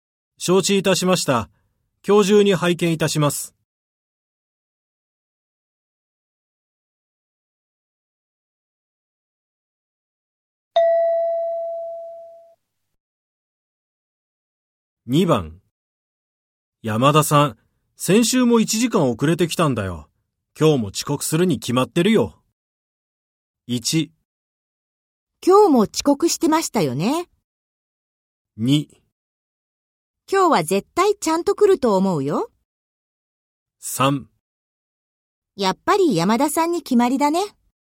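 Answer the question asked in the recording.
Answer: 2: 今日は絶対ちゃんと来ると思うよ。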